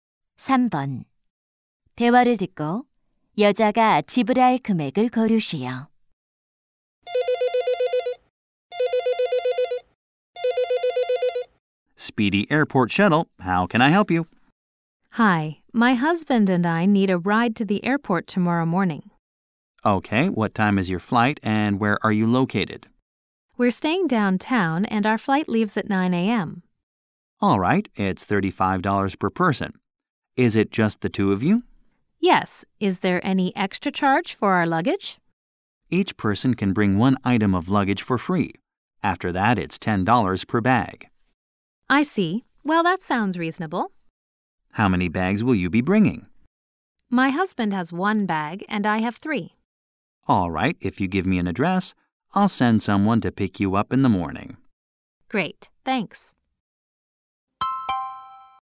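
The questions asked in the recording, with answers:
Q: 대화를 듣고 여자가 지불할 금액을 고르시오.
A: $90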